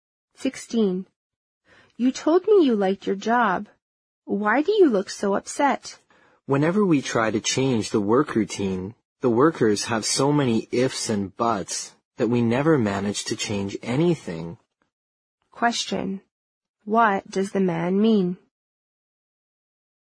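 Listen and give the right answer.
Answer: The workers resist any change to the work routine, so nothing ever changes.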